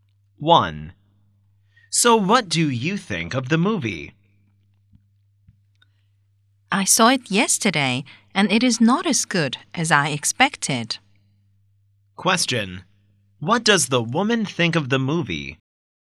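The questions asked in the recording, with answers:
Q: What does the woman think of the movie?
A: It was not as good as she expected.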